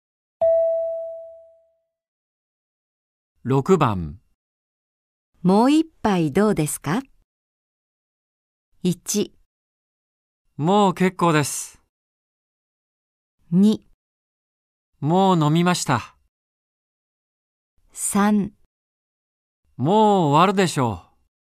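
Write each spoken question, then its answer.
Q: もう一杯どうですか。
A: 1: もう結構です。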